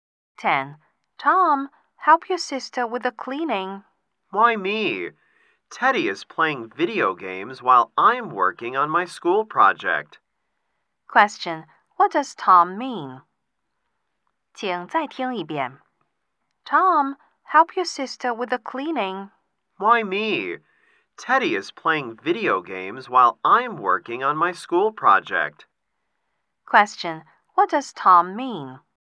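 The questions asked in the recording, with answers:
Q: Question: What does Tom mean?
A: Teddy should help his sister, not him, because he is busy with his school project.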